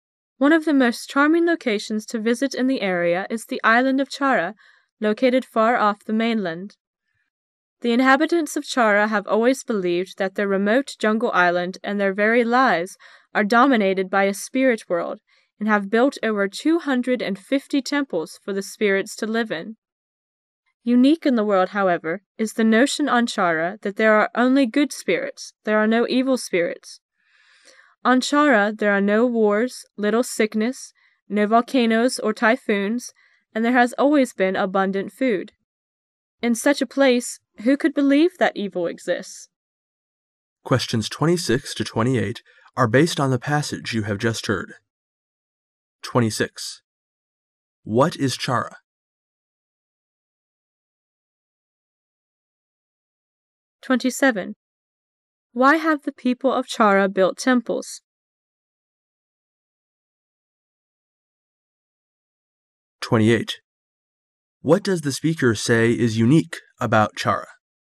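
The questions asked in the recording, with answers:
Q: What is Chara?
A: A remote jungle island far off the mainland

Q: Why have the people of Chara built temples?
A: For the spirits to live in

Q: What does the speaker say is unique about Chara?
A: People believe there are only good spirits, no evil spirits

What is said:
[解析] 26-28 One of the most charming locations to visit in the area is the island of Chard, located far off the mainland. The inhabitants of Chard have always believed that their remote jungle island and their very lives are dominated by. a spirit world and have built over 250 temples for the spirits to live in. Unique in the world, however, is the nation on Chard that there are only good spirits —there are no evil spirits. On Chard there are no wars, little sickness, no volcanoes or typhoons, and there has always been abundant food. In such a place, who could believe that evil exists?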